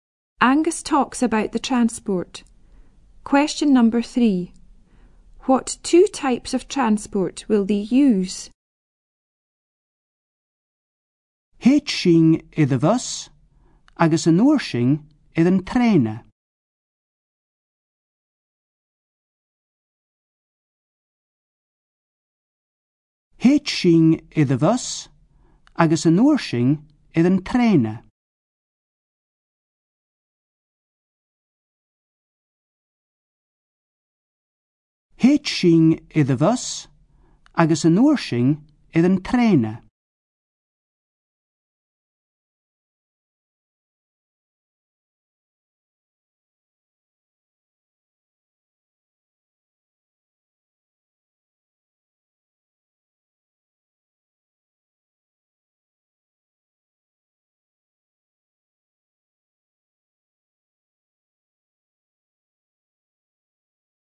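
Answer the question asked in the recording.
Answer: Bus and train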